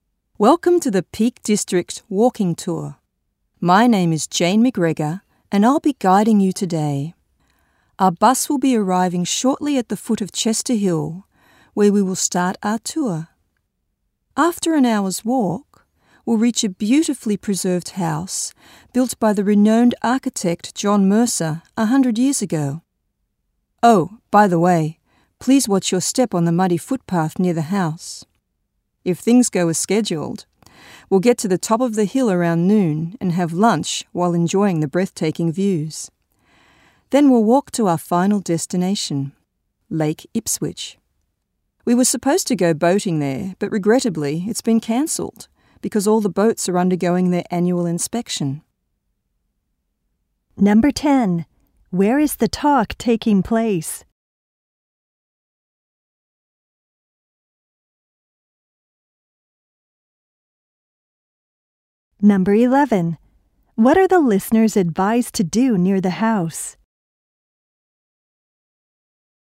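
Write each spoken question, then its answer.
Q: Where is the talk taking place?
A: On a bus

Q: What are the listeners advised to do near the house?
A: Watch their step on the muddy footpath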